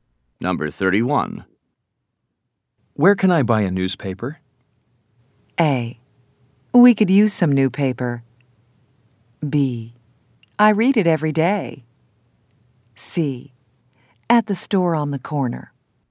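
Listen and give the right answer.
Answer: C: At the store on the corner.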